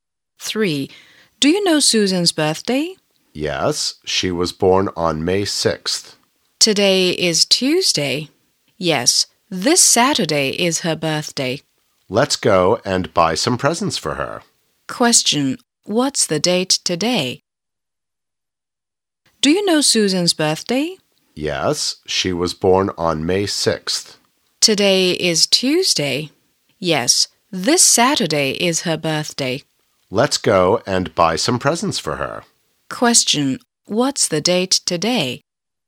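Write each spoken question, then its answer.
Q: What's the date today?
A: May 2nd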